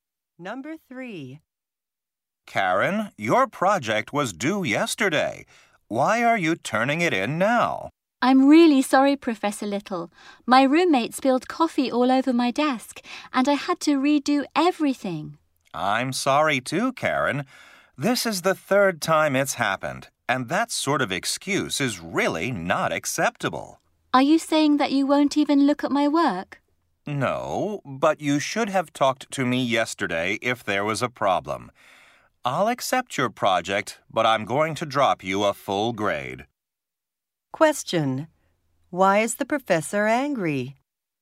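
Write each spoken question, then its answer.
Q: Why is the professor angry?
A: Karen has handed in work late again (third time) without telling him beforehand.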